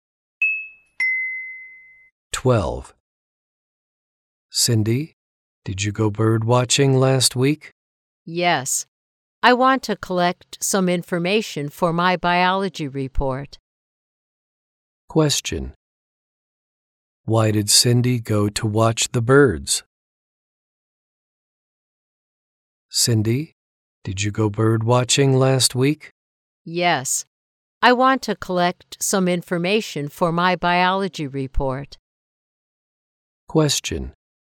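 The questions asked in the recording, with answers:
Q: Why did Cindy go to watch the birds?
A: To collect information for her biology report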